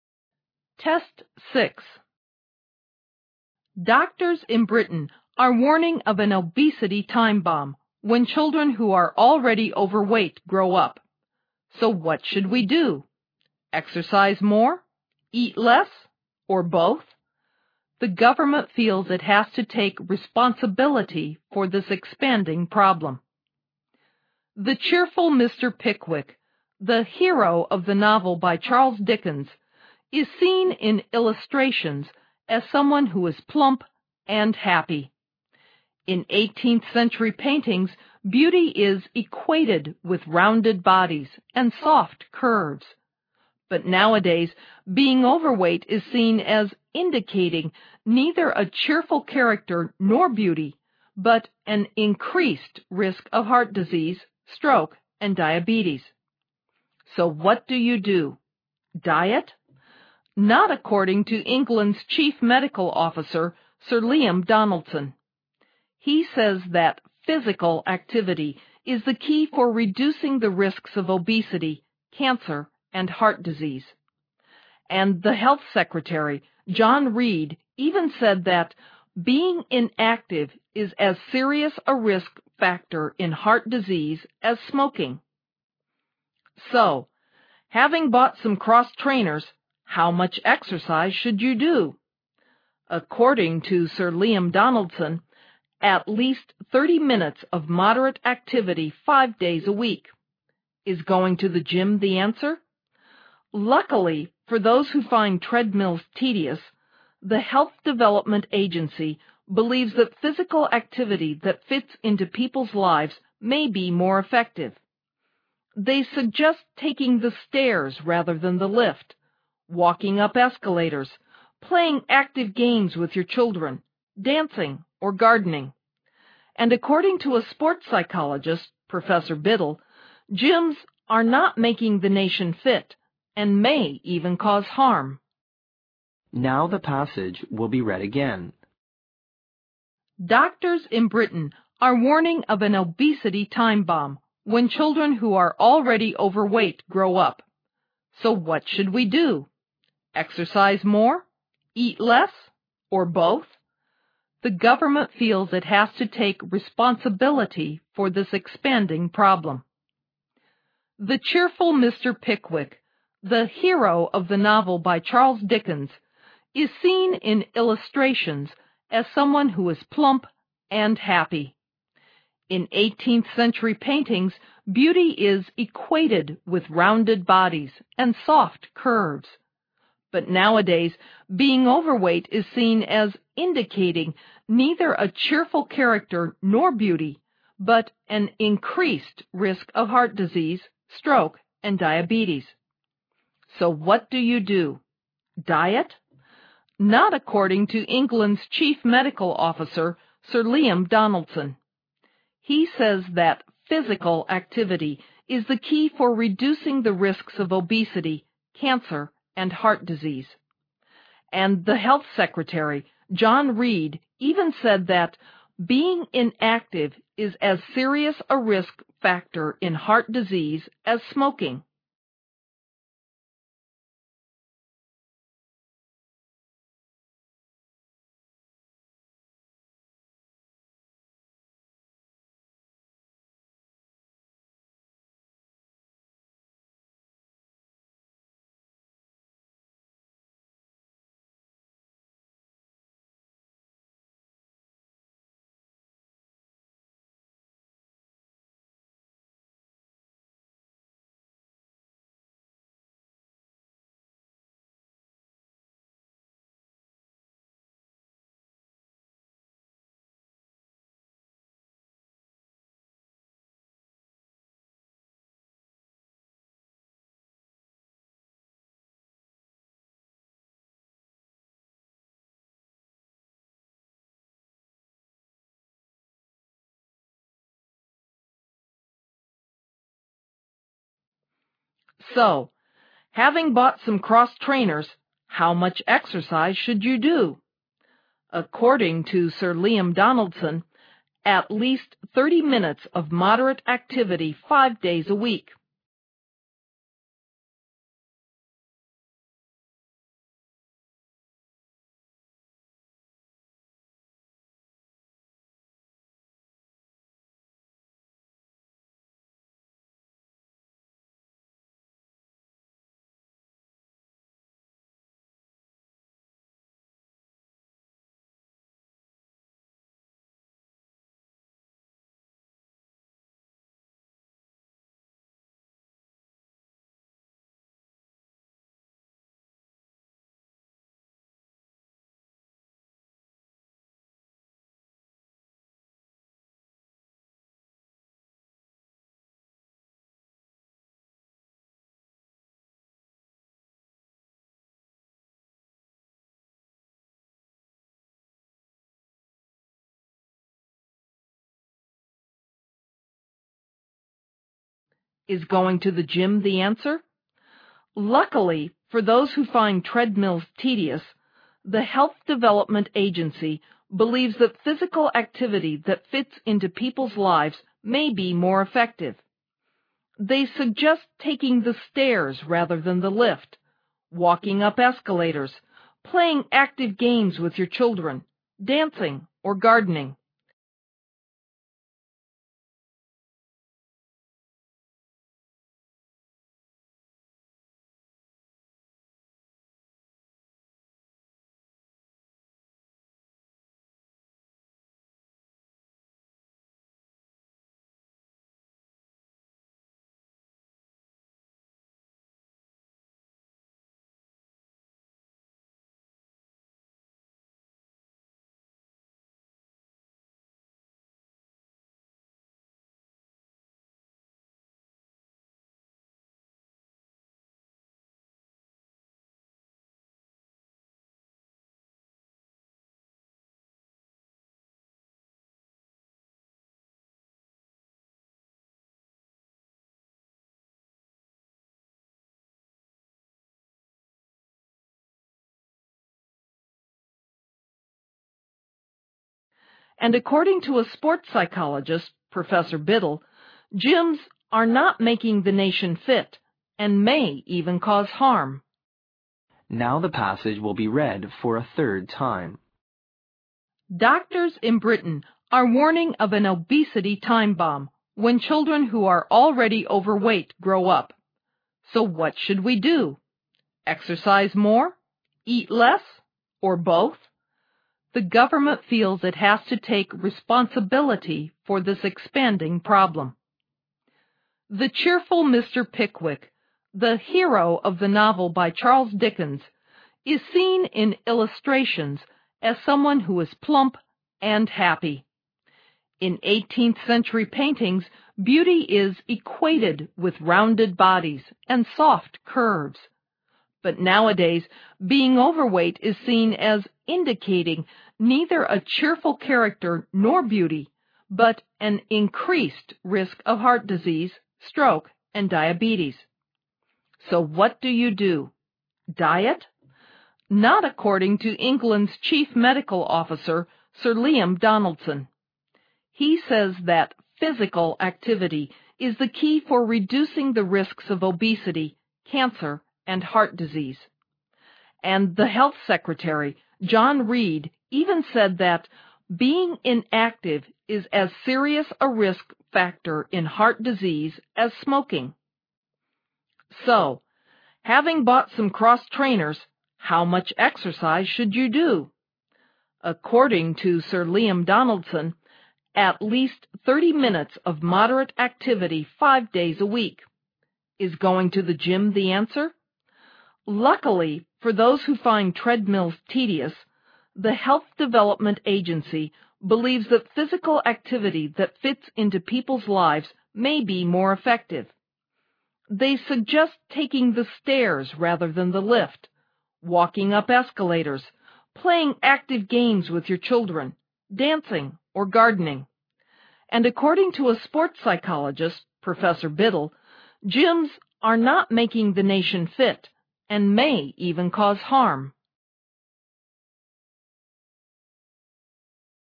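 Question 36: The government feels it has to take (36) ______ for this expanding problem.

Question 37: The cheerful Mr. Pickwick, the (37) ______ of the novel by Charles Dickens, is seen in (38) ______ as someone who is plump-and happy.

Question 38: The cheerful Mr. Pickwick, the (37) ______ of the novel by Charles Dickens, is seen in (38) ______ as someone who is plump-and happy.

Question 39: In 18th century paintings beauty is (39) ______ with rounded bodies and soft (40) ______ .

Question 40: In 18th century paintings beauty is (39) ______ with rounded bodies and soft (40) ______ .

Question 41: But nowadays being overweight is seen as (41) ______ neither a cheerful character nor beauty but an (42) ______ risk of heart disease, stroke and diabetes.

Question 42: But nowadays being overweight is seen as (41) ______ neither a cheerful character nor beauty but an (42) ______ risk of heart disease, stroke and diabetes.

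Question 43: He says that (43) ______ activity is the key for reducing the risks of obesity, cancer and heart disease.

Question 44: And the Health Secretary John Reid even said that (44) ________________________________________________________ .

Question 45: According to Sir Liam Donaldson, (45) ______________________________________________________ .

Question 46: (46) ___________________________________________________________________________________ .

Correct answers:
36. responsibility
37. hero
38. illustrations
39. equated
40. curves
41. indicating
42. increased
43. physical
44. being inactive is as serious a risk factor in heart disease as smoking
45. at least 30 minutes of moderate activity 5 days a week
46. They suggest taking the stairs rather than the lift, walking up escalators, playing active games with your children, dancing, or gardening

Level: 六级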